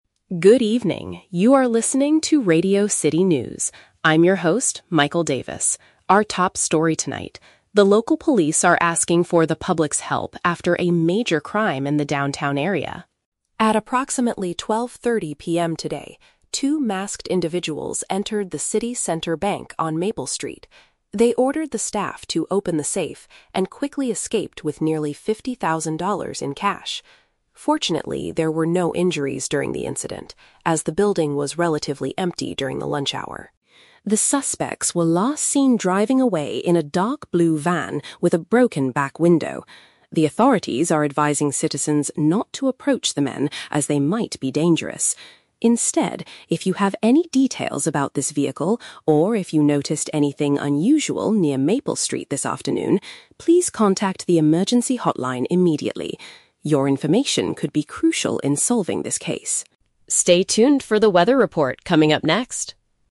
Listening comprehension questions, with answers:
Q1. What is the main event reported in this news bulletin?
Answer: A large amount of money stolen from a business.

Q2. Why was no one hurt during the crime?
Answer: Because there were very few people inside at the time.

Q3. What should listeners do if they see the dark blue van?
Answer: Call the emergency number right away.

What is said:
News Announcer: Good evening, you are listening to Radio City News. I'm your host, Michael Davis. Our top story tonight: the local police are asking for the public's help after a major crime in the downtown area.
At approximately 12:30 PM today, two masked individuals entered the City Center Bank on Maple Street. They ordered the staff to open the safe and quickly escaped with nearly fifty thousand dollars in cash. Fortunately, there were no injuries during the incident, as the building was relatively empty during the lunch hour.
The suspects were last seen driving away in a dark blue van with a broken back window. The authorities are advising citizens not to approach the men, as they might be dangerous. Instead, if you have any details about this vehicle, or if you noticed anything unusual near Maple Street this afternoon, please contact the emergency hotline immediately. Your information could be crucial in solving this case.
Stay tuned for the weather report coming up next.